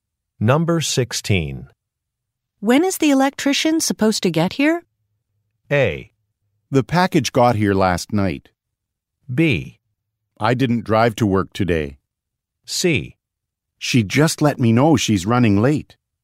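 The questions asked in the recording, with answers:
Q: When is the electrician supposed to get here?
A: C: She just let me know she's running late.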